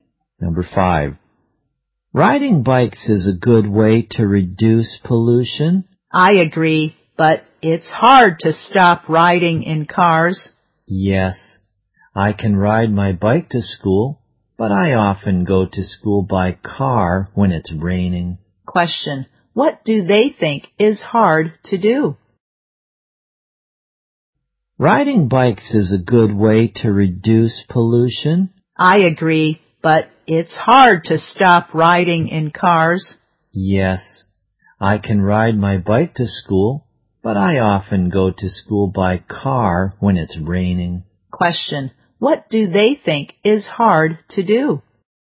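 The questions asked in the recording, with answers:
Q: Question, what do they think is hard to do?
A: To stop riding in cars.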